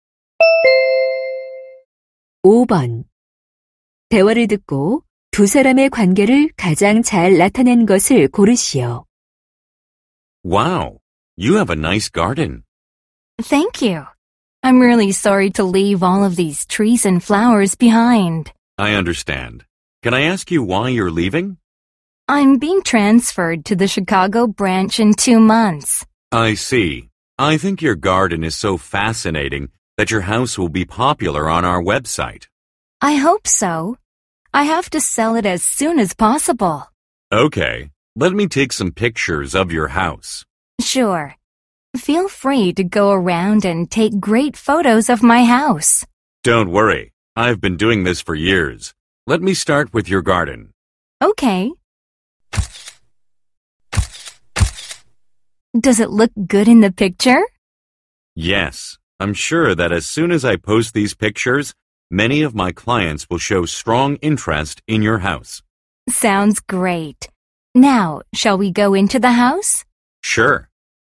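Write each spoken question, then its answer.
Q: 대화를 듣고 두 사람의 관계를 가장 잘 나타낸 것을 고르시오.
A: 부동산 중개인 - 집주인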